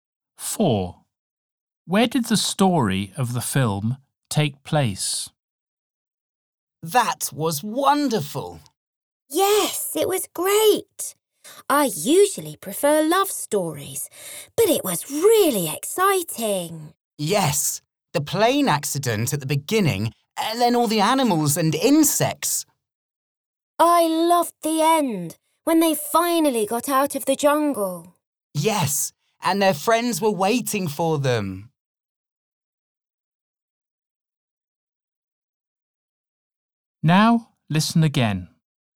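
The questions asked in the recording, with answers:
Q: Where did the story of the film take place?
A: In the jungle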